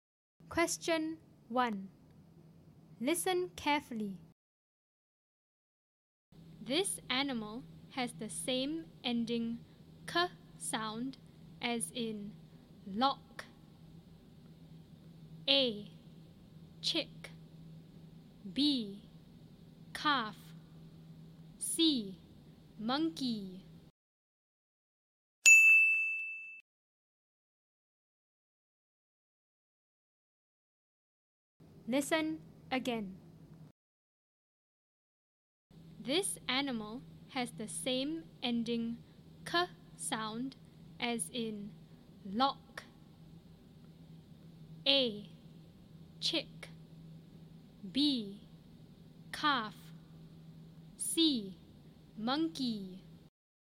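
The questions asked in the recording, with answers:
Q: This animal has the same ending k sound as in lock.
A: A: Chick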